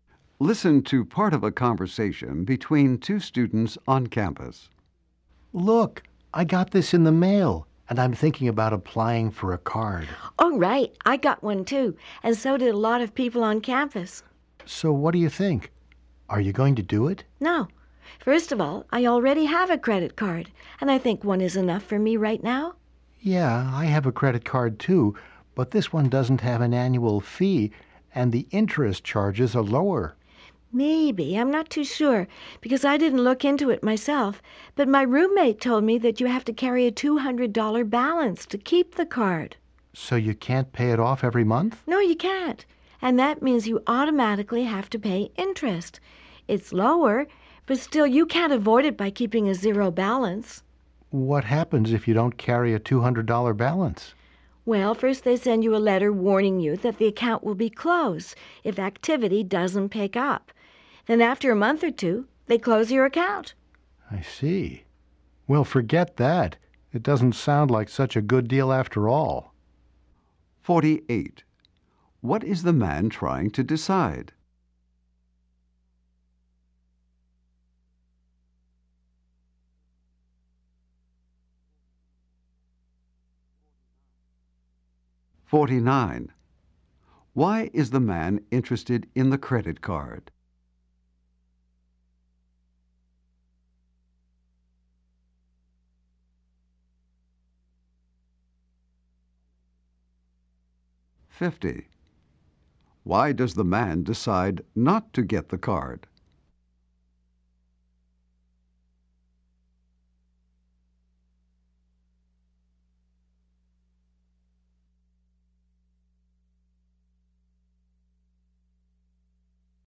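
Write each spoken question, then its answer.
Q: What is the man trying to decide?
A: Whether to apply for a credit card

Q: Why is the man interested in the credit card?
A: It has no annual fee and lower interest charges

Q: Why does the man decide not to get the card?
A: You must keep a $200 balance, so you always pay interest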